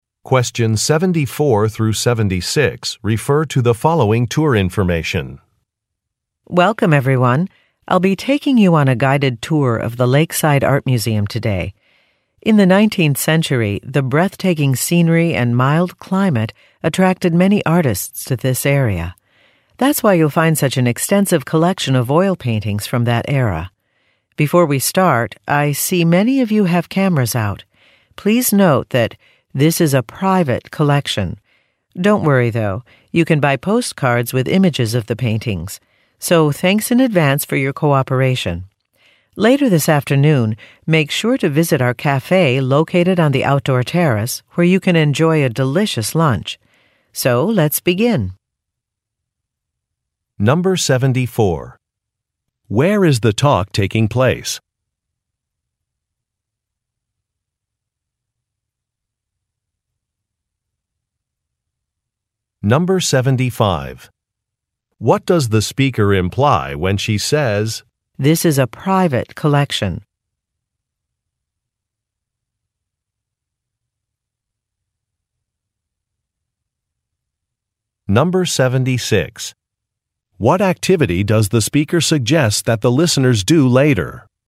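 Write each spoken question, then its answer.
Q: Where is the talk taking place?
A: At an art museum (Lakeside Art Museum)

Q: What does the speaker imply when she says, "This is a private collection"?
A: Taking photographs is not allowed

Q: What activity does the speaker suggest that the listeners do later?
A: Have lunch at the cafe on the outdoor terrace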